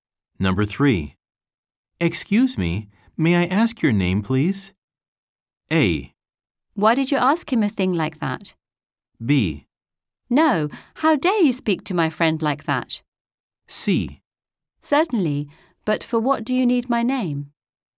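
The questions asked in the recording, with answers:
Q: Excuse me, may I ask your name, please?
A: C: Certainly, but for what do you need my name?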